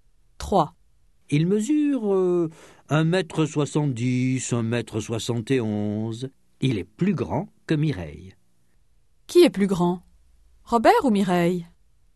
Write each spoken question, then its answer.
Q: Qui est plus grand ? Robert ou Mireille ?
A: Robert.